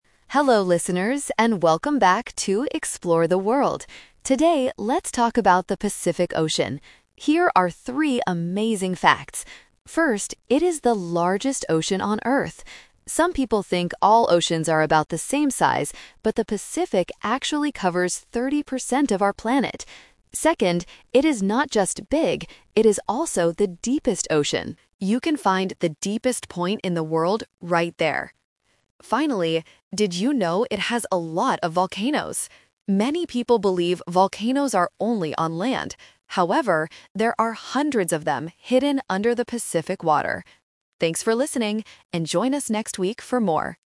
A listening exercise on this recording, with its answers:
Listen to a podcaster talking about the Pacific Ocean. Choose the correct answer (A, B, or C) for each question.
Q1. What do some people mistakenly think about the oceans?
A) They think the Pacific is the smallest ocean.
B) They think all oceans are about the same size.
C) They think the Pacific covers thirty percent of the Earth.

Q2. What is special about the depth of the Pacific Ocean?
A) It has the deepest point in the world.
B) It is too deep for animals to live in.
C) It is as deep as the other oceans.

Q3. What does the podcaster say about volcanoes?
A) There are no volcanoes in the Pacific Ocean.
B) People think there are hundreds of them under the water.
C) People usually believe volcanoes are only on land.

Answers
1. B) They think all oceans are about the same size.
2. A) It has the deepest point in the world.
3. C) People usually believe volcanoes are only on land.

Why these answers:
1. Why B is correct: The podcaster points out this mistake: "Some people think all oceans are about the same size..." Why A is wrong: The audio says the Pacific is the "largest", no one is mentioned to think it is the smallest. Why C is a trap: The Pacific does cover thirty percent of the Earth, but this is a true fact, not what people mistakenly think.
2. Why B is wrong: The depth is mentioned, but the audio never says it is too deep for animals. Why C is a trap: The audio says it is "the deepest", which means it is deeper than the other oceans, not the same.
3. Why C is correct: The podcaster mentions this common misconception: "Many people believe volcanoes are only on land." Why A is a trap: The audio states the opposite: "there are hundreds of them hidden under the Pacific water!" Why B is a trap: There are hundreds of volcanoes under the water, but people do not think this (they think they are on land). This uses the A2 Twist word "However" to contrast belief and reality.

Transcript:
Podcaster: Hello listeners, and welcome back to "Explore the World." Today, let's talk about the Pacific Ocean. Here are three amazing facts. First, it is the largest ocean on Earth. Some people think all oceans are about the same size, but the Pacific actually covers thirty percent of our planet. Second, it is not just big; it is also the deepest ocean. You can find the deepest point in the world right there. Finally, did you know it has a lot of volcanoes? Many people believe volcanoes are only on land. However, there are hundreds of them hidden under the Pacific water! Thanks for listening, and join us next week for more.

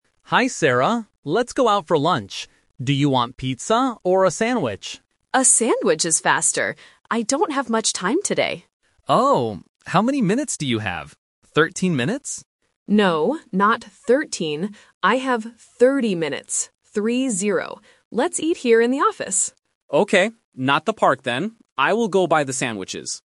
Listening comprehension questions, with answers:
Listen to the conversation between two colleagues. Choose the correct answer (A, B, or C).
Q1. What will they eat for lunch?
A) Pizza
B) A sandwich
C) Salad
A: B) A sandwich

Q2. How much time does Sarah have?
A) 13 minutes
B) 30 minutes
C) 60 minutes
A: B) 30 minutes

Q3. Where will they eat?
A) In the park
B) In the office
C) In a restaurant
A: B) In the office

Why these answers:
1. Mark asks if she wants pizza or a sandwich. Sarah chooses the sandwich because it is "faster". Mark also confirms at the end, "I will go buy the sandwiches."
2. Sarah clearly states, "I have 30 minutes," and spells out "Three-zero" to be sure.
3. Sarah says, "Let's eat here in the office."

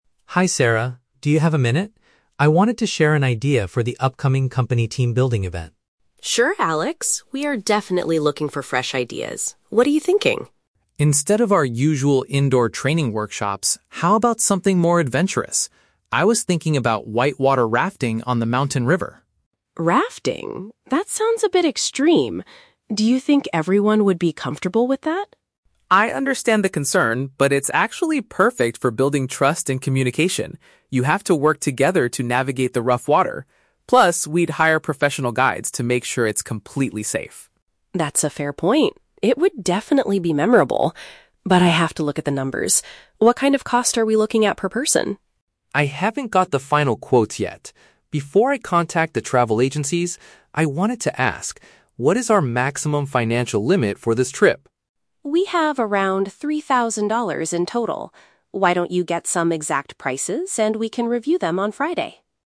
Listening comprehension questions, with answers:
Listen to the conversation between an employee and a Human Resources manager. Choose the correct answer (A, B, or C) for each question.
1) Why does Alex believe white-water rafting is a good idea for the company?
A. It helps improve how staff communicate and rely on each other.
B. It is much cheaper than the usual indoor training workshops.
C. It allows employees to relax during a peaceful boat ride.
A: A. It helps improve how staff communicate and rely on each other.

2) What is Sarah's first concern about the suggestion?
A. She worries that the mountain river is too far from the office.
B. She doubts that all staff members will feel relaxed doing it.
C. She thinks that hiring professional guides will be too expensive.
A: B. She doubts that all staff members will feel relaxed doing it.

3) What information does Alex need from Sarah before calling the agencies?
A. The total number of employees attending the trip.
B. The exact date when the event will take place.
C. The highest amount of money the company is willing to spend.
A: C. The highest amount of money the company is willing to spend.

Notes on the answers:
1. Alex says the activity is "perfect for building trust and communication" because they have to "work together." Option A perfectly paraphrases this by saying it improves how staff "communicate and rely on each other." Why the traps are wrong: Option B is a trap; the audio mentions "indoor training workshops," but Alex never says rafting is cheaper. Option C is incorrect because Alex describes the river as "rough water," not peaceful.
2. Sarah asks, "Do you think everyone would be comfortable with that?" because it sounds "a bit extreme." Feeling "relaxed" is a synonym for being comfortable in this context. Why the traps are wrong: Option A is plausible but never mentioned. Option C is a trap; the audio mentions "professional guides" and discusses money later, but Sarah does not complain about the cost of the guides.
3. Alex asks, "what is our maximum financial limit for this trip?" "Maximum financial limit" means the highest amount of money the company can spend. Why the traps are wrong: Option A is a plausible real-world detail, but Alex does not ask about the number of people. Option B is a trap using the word "date/Friday" from the audio, but Alex didn't ask for the date; Sarah suggested meeting on Friday.

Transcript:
Alex: Hi Sarah, do you have a minute? I wanted to share an idea for the upcoming company team-building event.
Sarah: Sure, Alex. We are definitely looking for fresh ideas. What are you thinking?
Alex: Instead of our usual indoor training workshops, how about something more adventurous? I was thinking about white-water rafting on the mountain river.
Sarah: Rafting? That sounds a bit extreme. Do you think everyone would be comfortable with that?
Alex: I understand the concern, but it's actually perfect for building trust and communication. You have to work together to navigate the rough water. Plus, we'd hire professional guides to make sure it's completely safe.
Sarah: That's a fair point. It would definitely be memorable. But I have to look at the numbers. What kind of cost are we looking at per person?
Alex: I haven't got the final quotes yet. Before I contact the travel agencies, I wanted to ask: what is our maximum financial limit for this trip?
Sarah: We have around three thousand dollars in total. Why don't you get some exact prices, and we can review them on Friday?

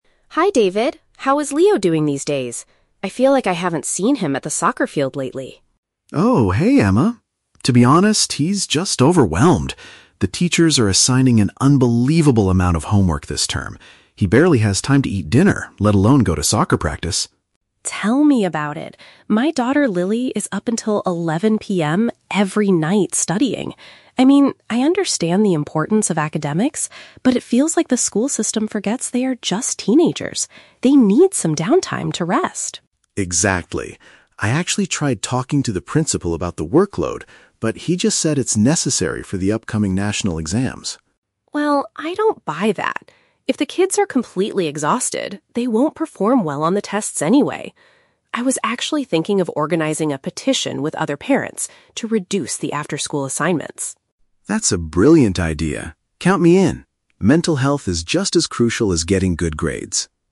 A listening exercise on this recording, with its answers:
Listen to the conversation between two parents and choose the correct answer (A, B, or C) for each question.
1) Why has David's son stopped playing soccer?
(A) He has too many academic tasks to complete.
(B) He usually eats his dinner at the soccer field.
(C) He has lost his interest in playing sports.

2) What is the principal's opinion about the current situation?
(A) Students should have more free time to stay healthy.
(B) The heavy workload is required to prepare for future tests.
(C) Parents need to help teenagers with their assignments.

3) What does Emma plan to do next?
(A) Have a private meeting with the school head.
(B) Move her daughter to a different educational system.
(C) Gather support from others to decrease the homework.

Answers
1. (A) He has too many academic tasks to complete.
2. (B) The heavy workload is required to prepare for future tests.
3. (C) Gather support from others to decrease the homework.

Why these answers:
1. David says his son is "overwhelmed" because teachers are assigning "an unbelievable amount of homework". Option A paraphrases "homework" as "academic tasks". The Trap: Option (B) contains the words "eats his dinner" and "soccer field" from the audio, but the context is completely wrong (David said he barely has time to eat dinner). Option (C) is a logical guess but is not mentioned in the audio.
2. The principal told David that the workload is "necessary for the upcoming national exams". Option B paraphrases this perfectly. The Trap: Option (A) is the trap. The idea of needing "downtime" (free time) to rest is Emma's and David's opinion, not the principal's. Option (C) is not mentioned.
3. Emma says she wants to "organize a petition with other parents to reduce the after-school assignments." Option C paraphrases this action as "gather support from others". The Trap: Option (A) is a trap. Having a meeting with the principal (school head) is what David already did, not what Emma plans to do. Option (B) is plausible for a frustrated parent but never mentioned.

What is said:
Emma: Hi David. How is Leo doing these days? I feel like I haven't seen him at the soccer field lately.
David: Oh, hey Emma. To be honest, he's just overwhelmed. The teachers are assigning an unbelievable amount of homework this term. He barely has time to eat dinner, let alone go to soccer practice.
Emma: Tell me about it! My daughter, Lily, is up until 11 PM every night studying. I mean, I understand the importance of academics, but it feels like the school system forgets they are just teenagers. They need some downtime to rest.
David: Exactly. I actually tried talking to the principal about the workload, but he just said it's necessary for the upcoming national exams.
Emma: Well, I don't buy that. If the kids are completely exhausted, they won't perform well on the tests anyway. I was actually thinking of organizing a petition with other parents to reduce the after-school assignments.
David: That's a brilliant idea. Count me in. Mental health is just as crucial as getting good grades.

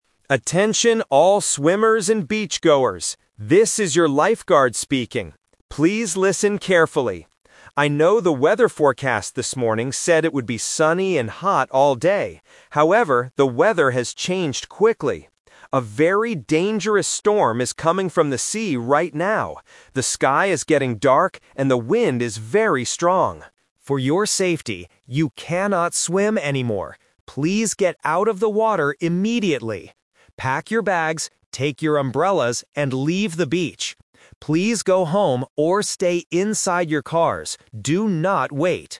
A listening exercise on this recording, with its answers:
Listen to the announcement and choose the best answer (A, B, or C).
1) What did the weather forecast say this morning?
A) It would be cloudy and windy.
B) It would be sunny and hot.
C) There would be a dangerous storm.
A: B) It would be sunny and hot.

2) What is happening with the weather right now?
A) A dangerous storm is coming.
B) It is becoming very sunny.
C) It is snowing heavily.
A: A) A dangerous storm is coming.

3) What does the lifeguard tell the people to do?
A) Stay in the water and swim carefully.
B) Wait under their umbrellas.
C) Get out of the water and leave the beach.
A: C) Get out of the water and leave the beach.

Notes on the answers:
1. The lifeguard says, "the weather forecast this morning said it would be sunny and hot all day." Option (C) is the trap because the storm is the actual weather happening right now, not what the morning forecast predicted. Option (A) is plausible but not mentioned.
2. The lifeguard warns, "A very dangerous storm is coming from the sea right now." Option (B) is the trap because "sunny" was the old forecast from the morning. Option (C) is never mentioned.
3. The explicit instruction is: "Please get out of the water immediately! ... leave the beach." Option (A) is the trap because it is the exact opposite of what they should do ("you cannot swim anymore"). Option (B) is a trap because the lifeguard tells them to take their umbrellas and leave, not to wait under them.

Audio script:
Lifeguard: Attention all swimmers and beachgoers! This is your lifeguard speaking. Please listen carefully. I know the weather forecast this morning said it would be sunny and hot all day. However, the weather has changed quickly. A very dangerous storm is coming from the sea right now. The sky is getting dark, and the wind is very strong. For your safety, you cannot swim anymore. Please get out of the water immediately! Pack your bags, take your umbrellas, and leave the beach.

